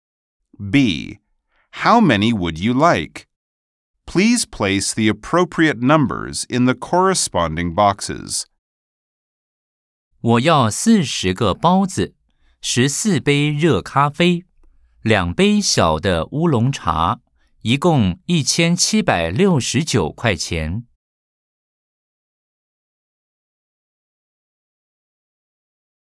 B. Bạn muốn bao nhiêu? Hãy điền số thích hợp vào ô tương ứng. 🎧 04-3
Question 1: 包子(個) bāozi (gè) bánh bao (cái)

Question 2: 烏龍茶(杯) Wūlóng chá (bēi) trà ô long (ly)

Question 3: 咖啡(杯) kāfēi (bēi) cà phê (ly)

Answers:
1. 40
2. 2
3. 14